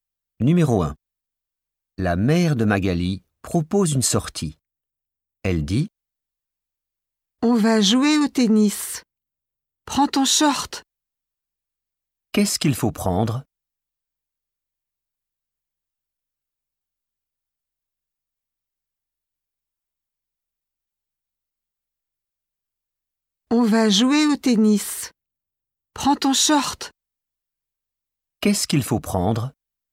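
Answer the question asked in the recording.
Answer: son short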